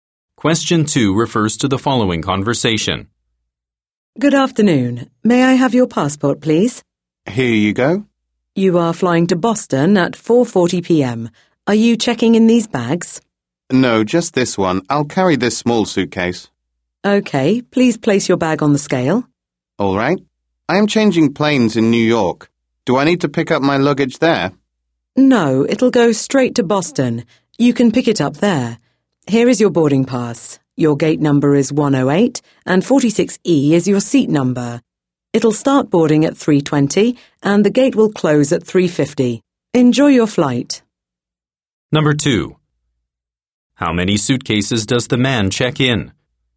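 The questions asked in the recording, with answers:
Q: How many suitcases does the man check in?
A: One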